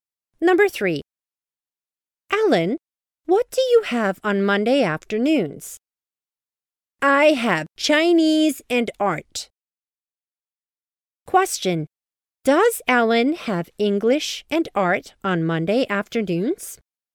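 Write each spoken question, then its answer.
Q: Question. Does Ellen have English and art on Monday afternoons?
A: No, she has Chinese and art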